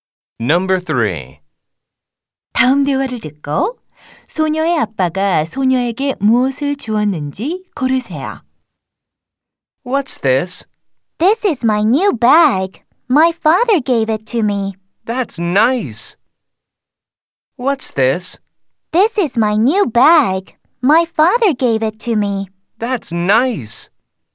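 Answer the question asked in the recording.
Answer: 새 가방 (a new bag)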